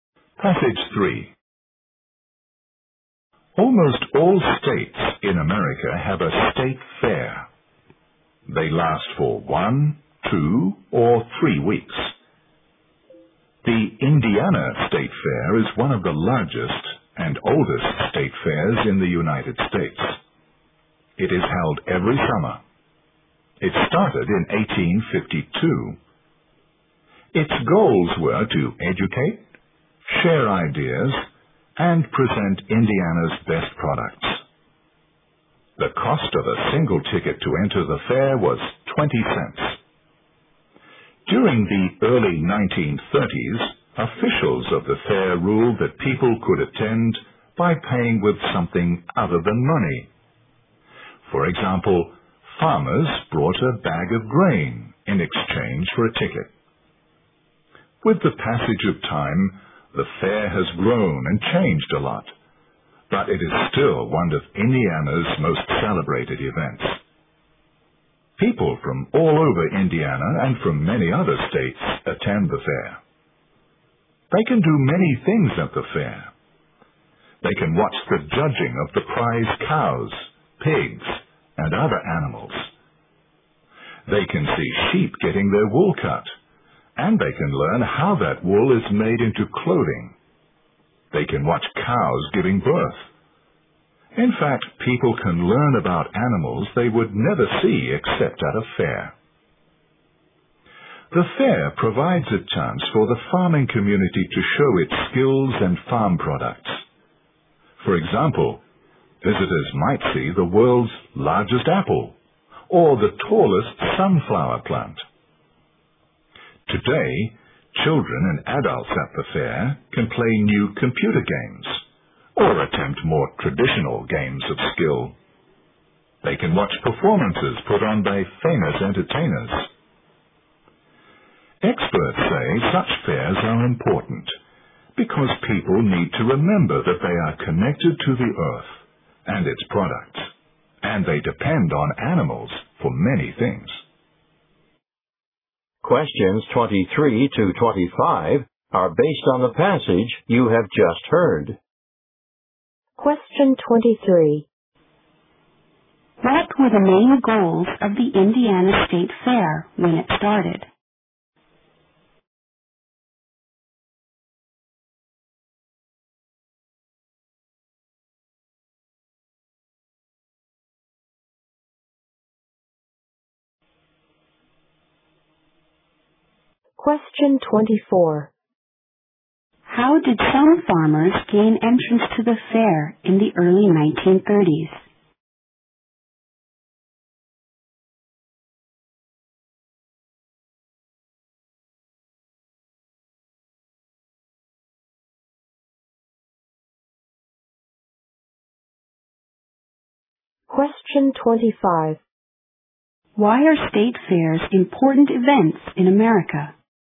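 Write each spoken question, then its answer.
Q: What were the main goals of the Indiana State Fair when it started?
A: To educate, share ideas, and present Indiana's best products

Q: How did some farmers gain entrance to the fair in the early 1930s?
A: By bringing a bag of grain in exchange for a ticket

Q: Why are state fairs important events in America?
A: They remind people that they are connected to the earth and its products and depend on animals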